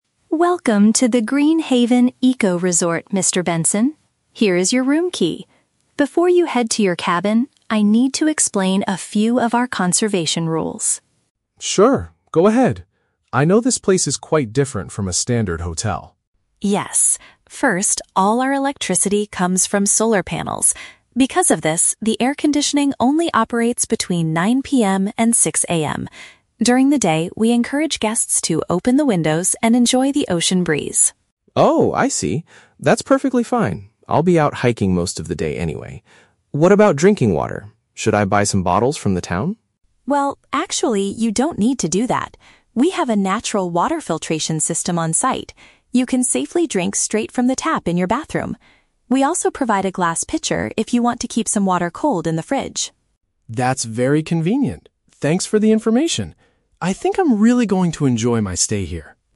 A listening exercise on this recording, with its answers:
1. Why is the air conditioning restricted to certain hours?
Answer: Because the resort relies on energy from the sun.

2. What does the receptionist tell the guest about drinking water?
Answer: It is safe to consume the water from the bathroom sink.

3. How does Mr. Benson react to the resort's conservation policies?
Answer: He is understanding and finds the rules acceptable.

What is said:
Maya: Welcome to the Green Haven Eco-resort, Mr. Benson. Here is your room key. Before you head to your cabin, I need to explain a few of our conservation rules.
Mr. Benson: Sure, go ahead. I know this place is quite different from a standard hotel.
Maya: Yes. First, all our electricity comes from solar panels. Because of this, the air conditioning only operates between 9 PM and 6 AM. During the day, we encourage guests to open the windows and enjoy the ocean breeze.
Mr. Benson: Oh, I see. That's perfectly fine, I'll be out hiking most of the day anyway. What about drinking water? Should I buy some bottles from the town?
Maya: Well, actually, you don't need to do that. We have a natural water filtration system on site. You can safely drink straight from the tap in your bathroom. We also provide a glass pitcher if you want to keep some water cold in the fridge.
Mr. Benson: That's very convenient. Thanks for the information! I think I'm really going to enjoy my stay here.